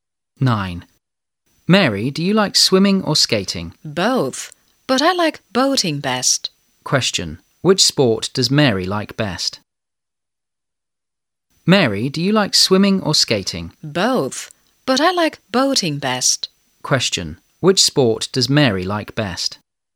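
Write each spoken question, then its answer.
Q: Question. Which sport does Mary like best?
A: Boating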